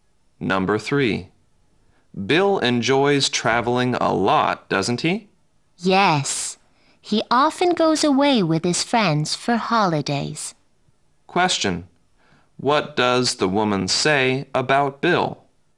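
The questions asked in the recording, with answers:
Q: What does the woman say about Bill?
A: He often goes away on holidays with his friends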